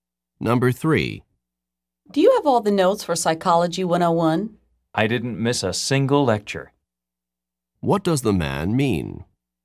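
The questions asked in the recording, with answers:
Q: What does the man mean?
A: He has all the notes because he attended every lecture.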